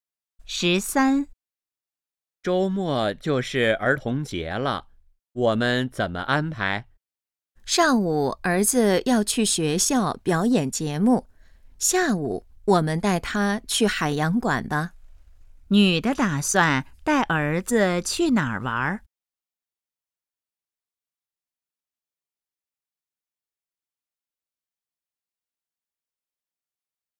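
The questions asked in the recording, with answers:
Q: 女的打算带儿子去哪儿玩?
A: 海洋馆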